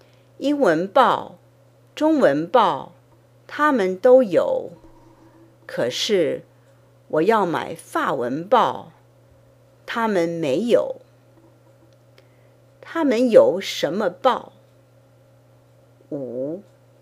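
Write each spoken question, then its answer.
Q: 他们有什么报?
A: 英文报、中文报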